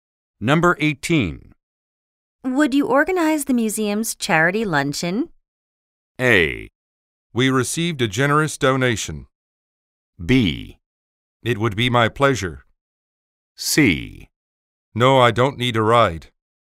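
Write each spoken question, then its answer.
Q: Would you organize the museum's charity luncheon?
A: B: It would be my pleasure.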